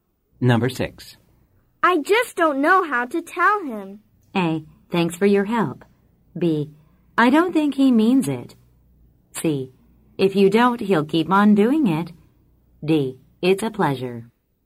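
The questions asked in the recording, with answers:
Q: I just don't know how to tell him.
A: C: If you don't, he'll keep on doing it.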